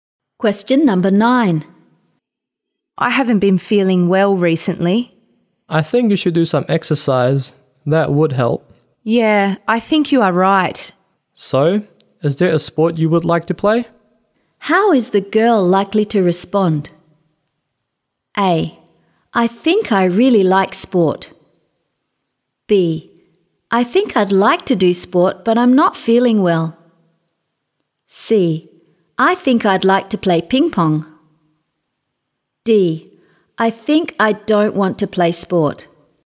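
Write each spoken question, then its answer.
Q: How is the girl likely to respond?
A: C: I think I'd like to play ping pong.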